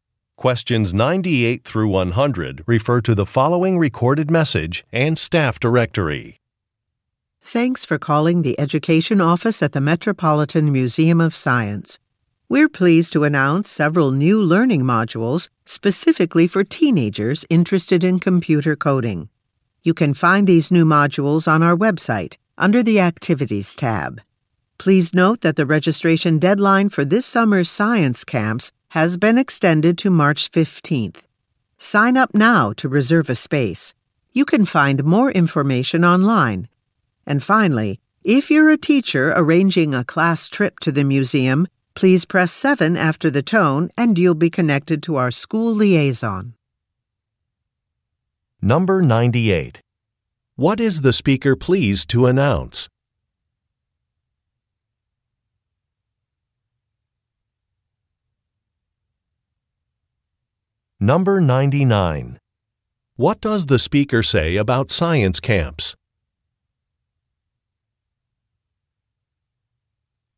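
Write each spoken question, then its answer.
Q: What is the speaker pleased to announce?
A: New computer coding learning modules for teenagers

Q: What does the speaker say about science camps?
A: The registration deadline has been extended to March 15th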